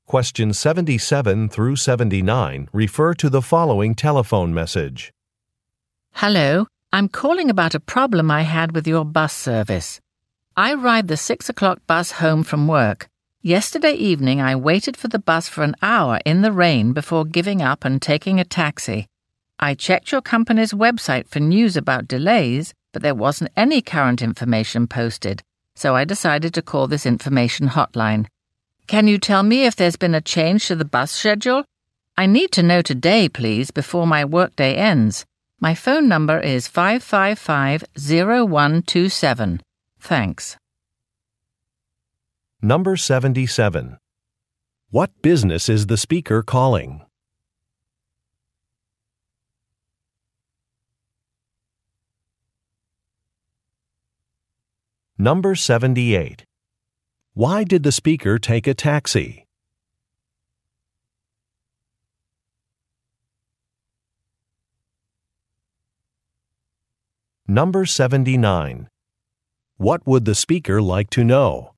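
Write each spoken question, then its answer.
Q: What business is the speaker calling?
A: A bus company

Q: Why did the speaker take a taxi?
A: The bus did not come after waiting an hour

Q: What would the speaker like to know?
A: If the bus schedule has changed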